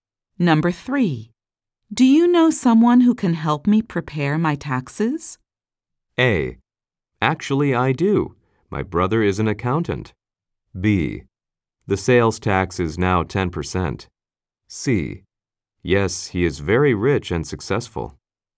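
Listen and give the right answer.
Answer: A: Actually, I do. My brother is an accountant.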